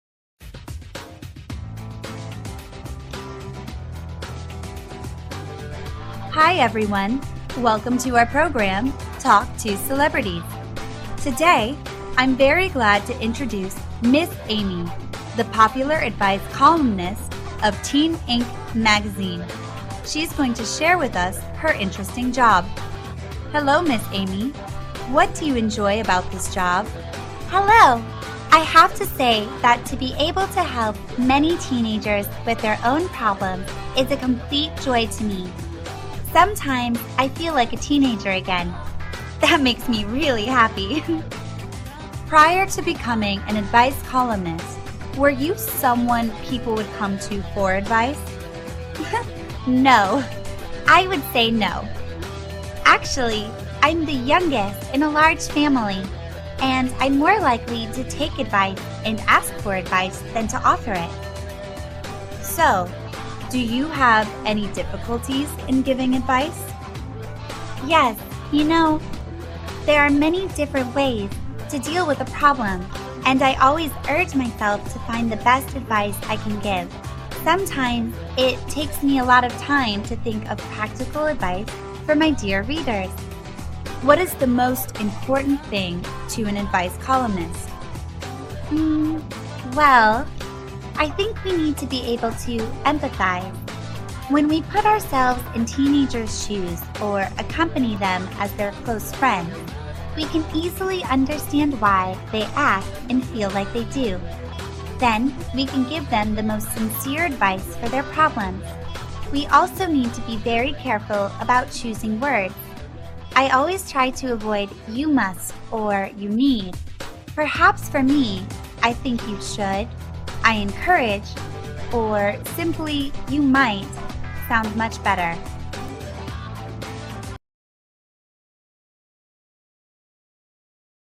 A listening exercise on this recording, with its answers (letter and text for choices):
Task: Choose the correct answer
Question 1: Amy enjoys her job because she can...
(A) Help teenagers with their problems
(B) Work from home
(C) Travel to many countries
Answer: (A) Help teenagers with their problems

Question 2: What does Amy think is the most important quality of an advice columnist?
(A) Creativity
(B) Empathy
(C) Confidence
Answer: (B) Empathy

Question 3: Amy prefers using which phrases when giving advice?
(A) "You must"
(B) "You need to"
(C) "You should"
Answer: (C) "You should"

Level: lớp 9